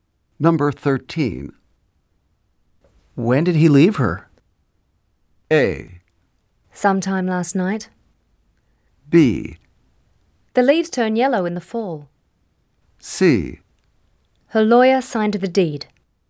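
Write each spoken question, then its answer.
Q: When did he leave her?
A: A: Sometime last night.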